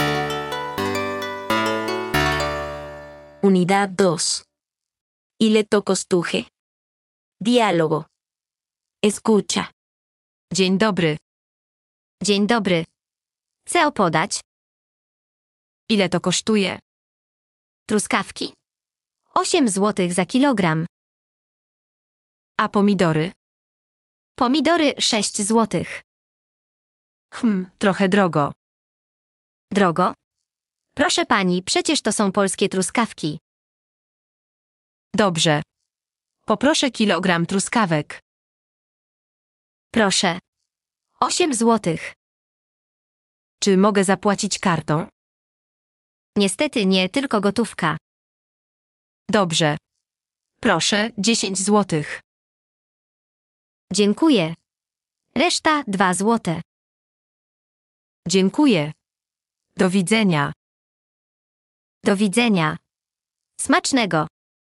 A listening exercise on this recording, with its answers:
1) ¿Cuánto cuesta el kilo de fresas? ¿Y el de tomates?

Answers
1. Las fresas, 8 zł el kilo; los tomates, 6 zł.

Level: A0–A1